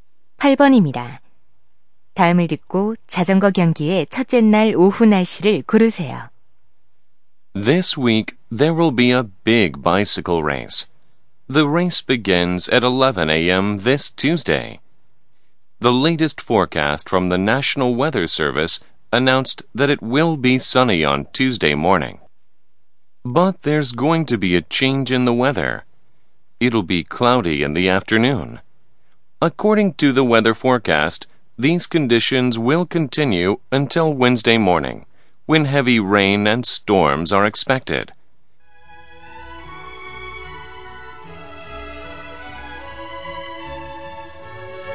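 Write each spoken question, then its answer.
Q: 다음을 듣고 자전거 경기의 첫째 날 오후 날씨를 고르세요.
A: 흐림 (cloudy)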